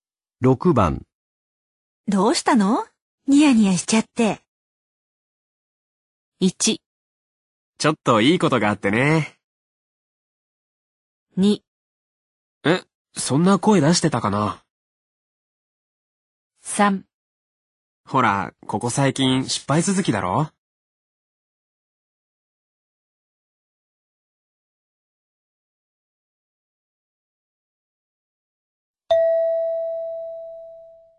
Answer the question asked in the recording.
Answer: 1

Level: N2 Listening · Test 12